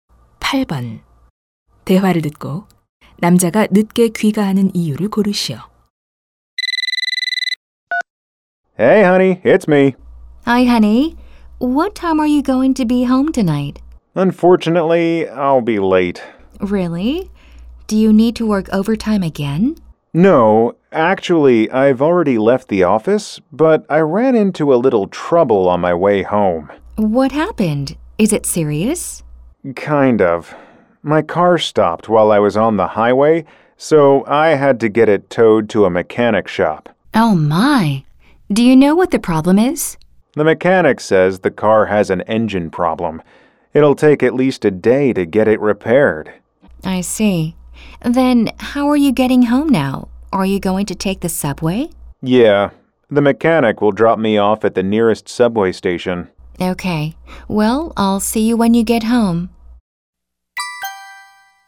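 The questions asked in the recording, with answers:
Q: 대화를 듣고 남자가 늦게 귀가하는 이유를 고르시오.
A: 고속도로에서 차가 고장 나서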